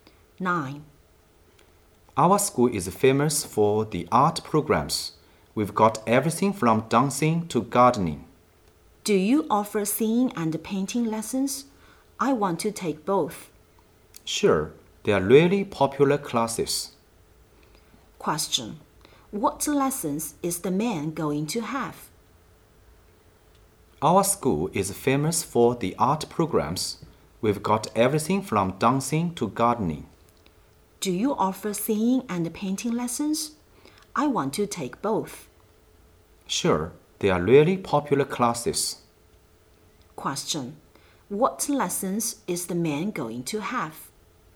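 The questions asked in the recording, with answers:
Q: What lessons is the man going to have?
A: Singing and painting lessons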